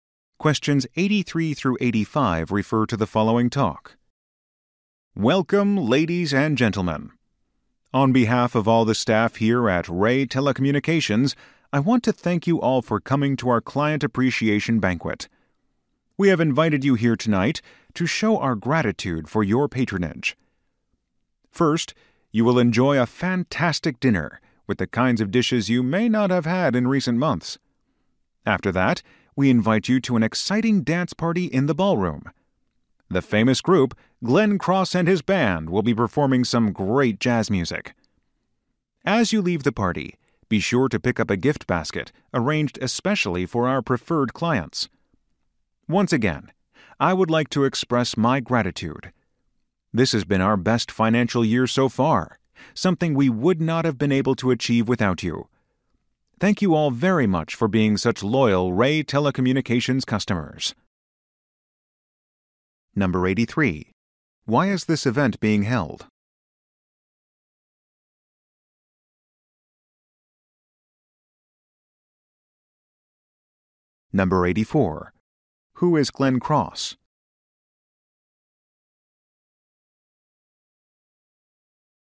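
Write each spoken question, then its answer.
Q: Why is this event being held?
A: To thank clients

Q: Who is Glenn Cross?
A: A jazz band leader/musician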